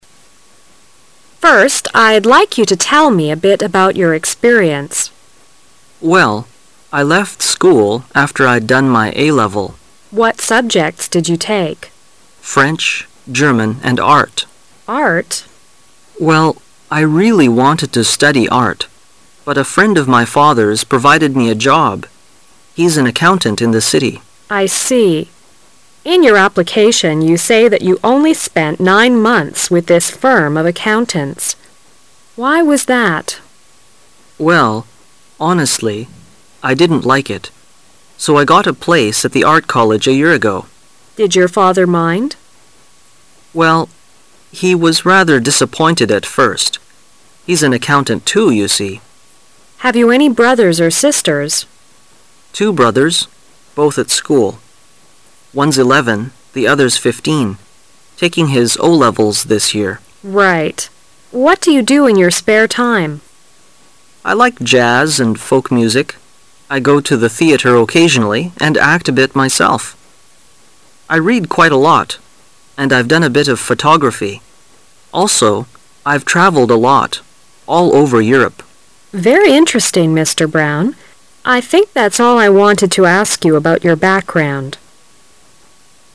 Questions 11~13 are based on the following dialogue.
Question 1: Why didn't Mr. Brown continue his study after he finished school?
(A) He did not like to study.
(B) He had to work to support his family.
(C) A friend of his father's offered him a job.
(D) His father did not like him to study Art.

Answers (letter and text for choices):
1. (C) A friend of his father's offered him a job.

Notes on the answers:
11-13 W: First, I'd like you to tell me a bit about your experience. M: Well, I left school after I'd done my A-level. W: What subjects did you take? M: French, German and Art. W: Art? M: Well, I really wanted to study Art. But a friend of my father's provided me a job -- he's an accountant in the city. W: I see. In your application, you say that you only spent nine months with this firm of accountants. Why was that? M: Well, honestly, I didn't like it -- so I got a place at the Art College a year ago. W: Did your father mind? M: Well, he was rather disappointed at first. He's an accountant too, you see. W: Have you any brothers or sisters? M:Two brothers, both at school. One's eleven, the other's fifteen -- taking his O-levels this year. W: Right. What do you do in your spare time? M: I like jazz and folk music; I go to the theater occasionally and act a bit myself. I read quite a lot, and I've done a bit of photography. Also, I've travelled a lot -- all over Europe. W: Very interesting, Mr. Brown. I think that's all I wanted to ask about your background.

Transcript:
[解析] 11-13 W: First, I'd like you to tell me a bit about your experience. M: Well, I left school after I'd done my A-level. W: What subjects did you take? M: French, German and Art. W: Art? M: Well, I really wanted to study Art. But a friend of my father's provided me a job -- he's an accountant in the city. W: I see. In your application, you say that you only spent nine months with this firm of accountants. Why was that? M: Well, honestly, I didn't like it -- so I got a place at the Art College a year ago. W: Did your father mind? M: Well, he was rather disappointed at first. He's an accountant too, you see. W: Have you any brothers or sisters? M:Two brothers, both at school. One's eleven, the other's fifteen -- taking his O-levels this year. W: Right. What do you do in your spare time? M: I like jazz and folk music; I go to the theater occasionally and act a bit myself. I read quite a lot, and I've done a bit of photography. Also, I've travelled a lot -- all over Europe. W: Very interesting, Mr. Brown. I think that's all I wanted to ask about your background.